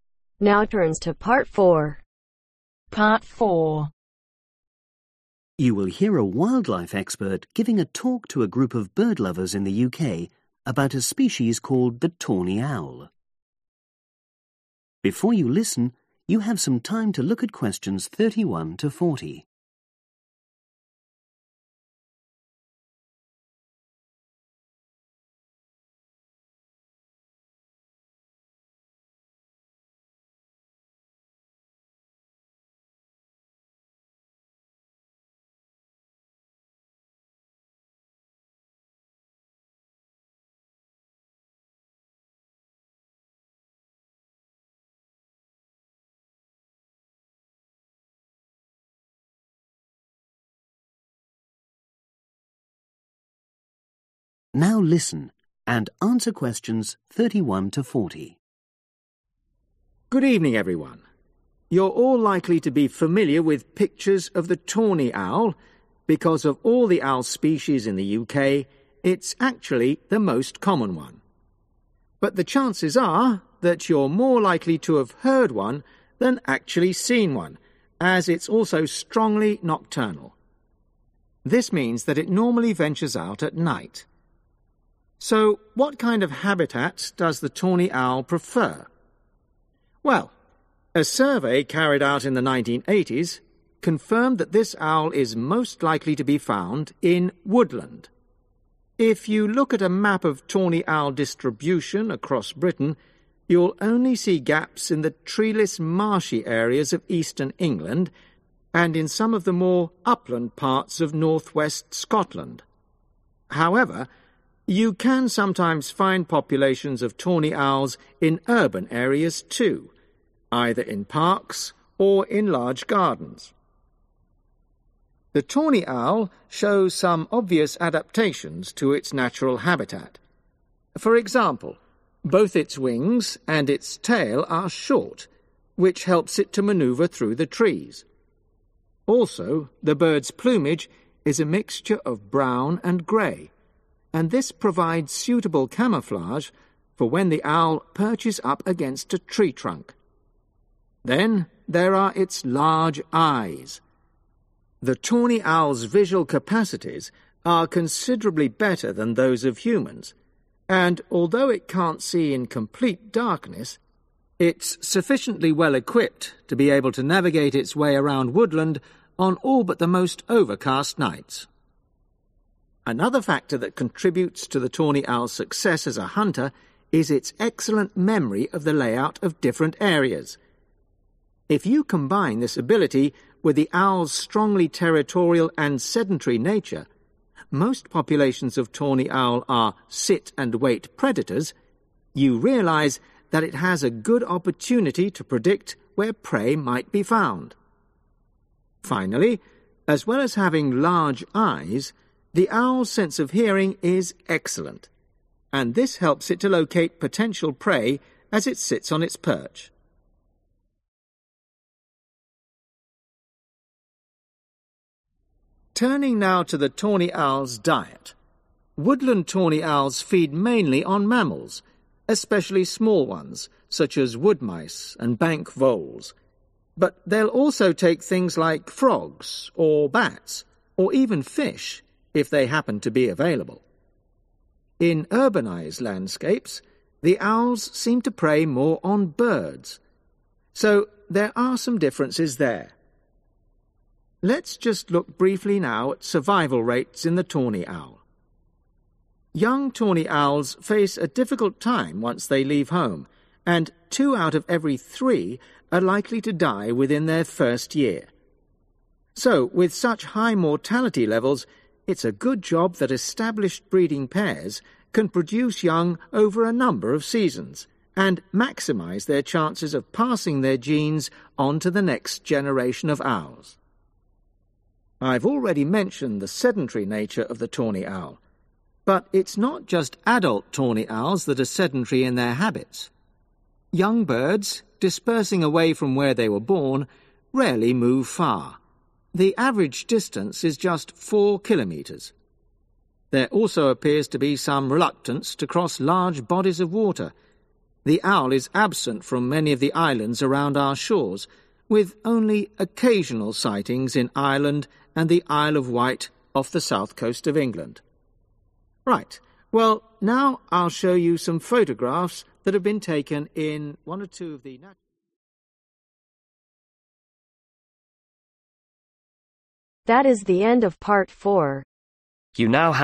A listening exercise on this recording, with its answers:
Complete the notes below. Write ONE WORD ONLY for each answer.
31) Most (31)............. owl species in UK strongly nocturnal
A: common

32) Mainly lives in (32)............, but can also be seen in urban areas, e.g. parks.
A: woodland/woods/forests

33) Short wings and (33)............, for navigation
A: tail

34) Brown and (34)............ feathers, for camouflage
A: grey/gray

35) Large eyes (more effective than those of (35)............, for good night vision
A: humans/people

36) Very goof spatial (36)............ for predicting where prey might be found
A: memory

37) Excellent (37)..........., for locating prey from a perch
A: hearing

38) Owls in urban areas eat more (38)............. .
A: birds

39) Two thirds of young owls die within a (39)............ .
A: year

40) Owls seen dislike flying over large areas of (40)............ .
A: water